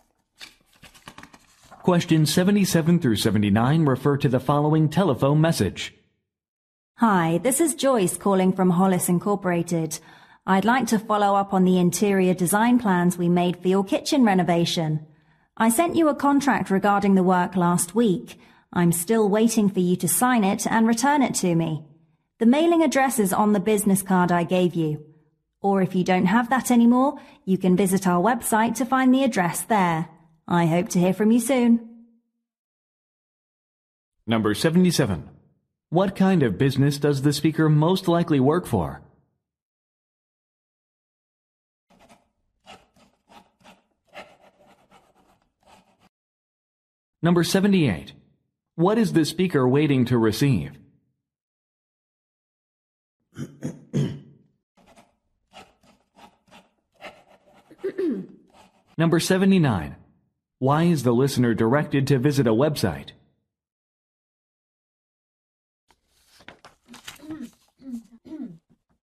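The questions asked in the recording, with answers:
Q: What kind of business does the speaker most likely work for?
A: An interior design company

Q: What is the speaker waiting to receive?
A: A signed contract

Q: Why is the listener directed to visit a website?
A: To find the mailing address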